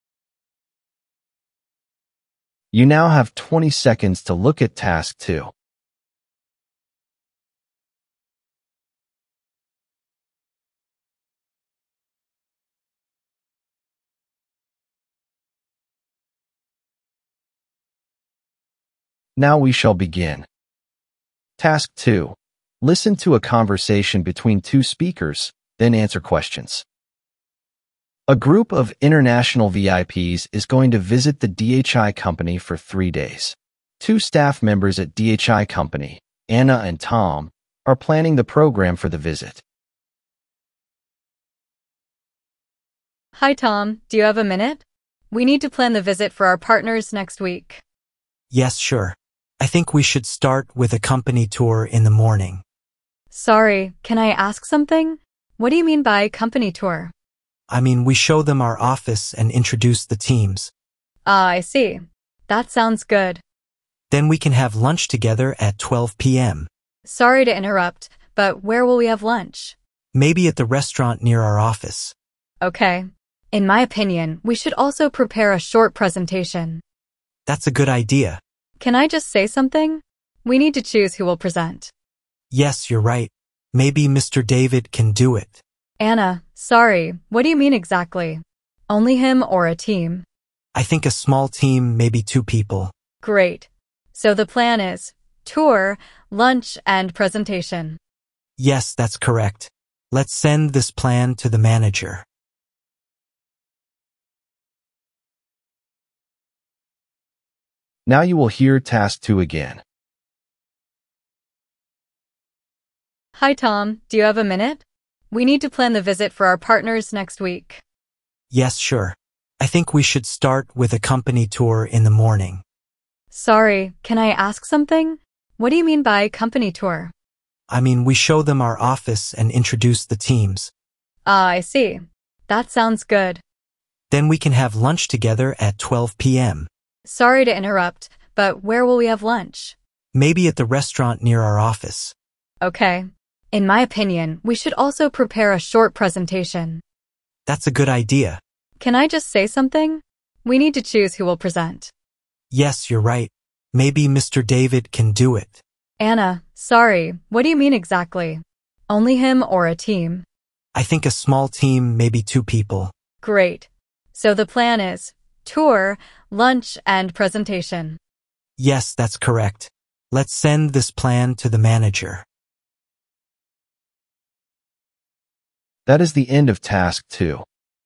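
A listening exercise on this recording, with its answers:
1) What are Anna and Tom planning?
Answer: A company visit

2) What activity do they plan first?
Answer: Company tour

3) Where will they have lunch?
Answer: At a restaurant near the office

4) What does Anna suggest adding to the plan?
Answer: A presentation

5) What will they do after making the plan?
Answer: Send the plan to the manager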